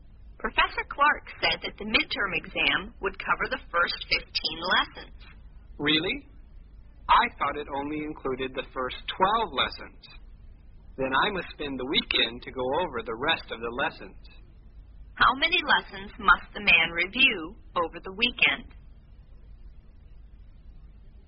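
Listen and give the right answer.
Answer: Three lessons (lessons 13 to 15)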